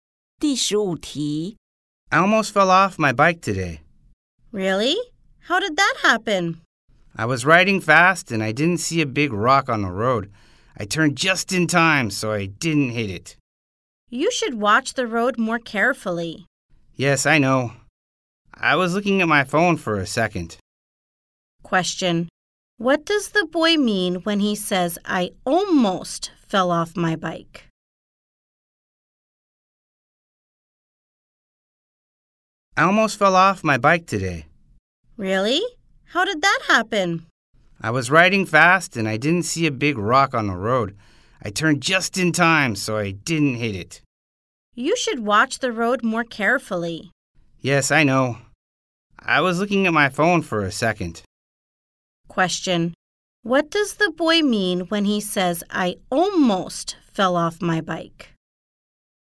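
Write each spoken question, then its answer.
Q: What does the boy mean when he says, I almost fell off my bike?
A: He nearly had an accident but did not fall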